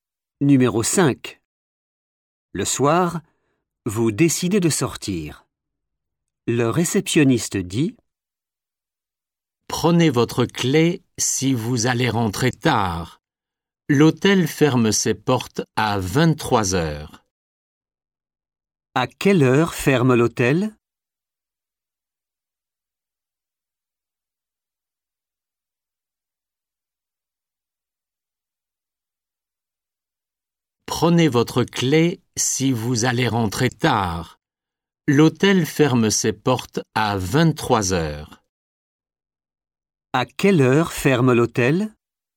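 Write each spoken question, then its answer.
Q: À quelle heure ferme l'hôtel?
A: à 23 heures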